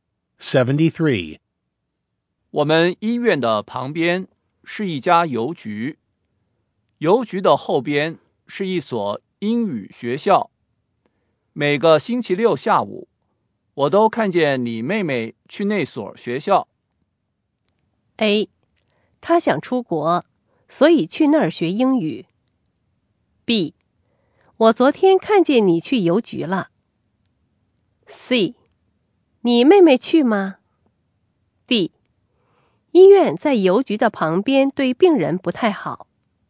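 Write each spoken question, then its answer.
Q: 我们医院的旁边是一家邮局,邮局的后边是一所英语学校。每个星期六下午,我都看见你妹妹去那所学校。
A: A: 她想出国,所以去那儿学英语。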